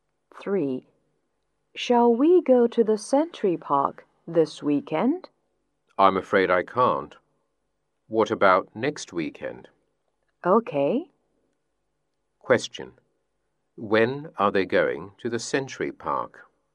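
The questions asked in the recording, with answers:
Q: When are they going to the Century Park?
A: Next weekend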